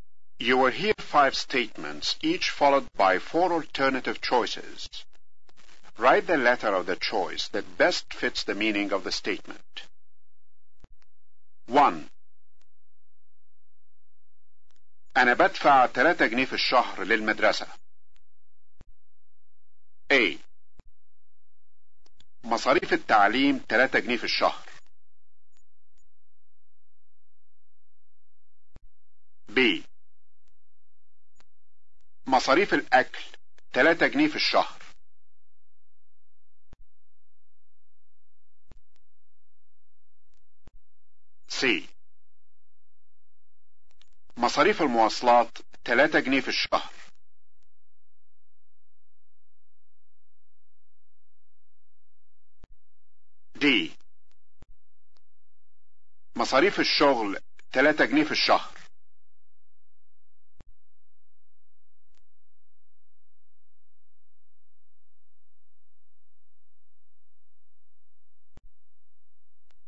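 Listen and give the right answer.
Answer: A: مصاريف التعليم 3 جنيه في الشهر.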